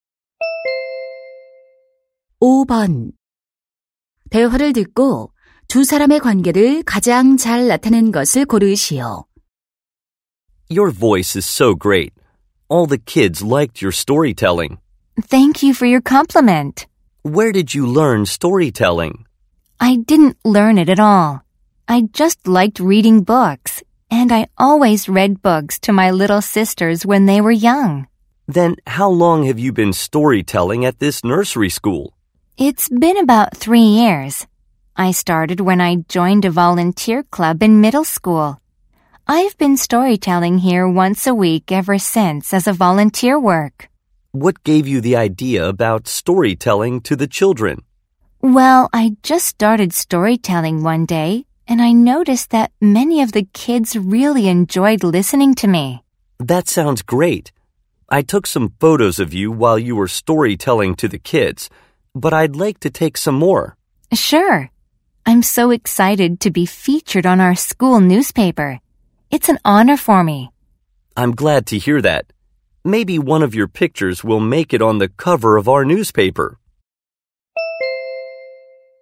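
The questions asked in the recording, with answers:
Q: 대화를 듣고 두 사람의 관계를 가장 잘 나타낸 것을 고르시오.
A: 학교 신문 기자 - 자원봉사로 동화 구연을 하는 학생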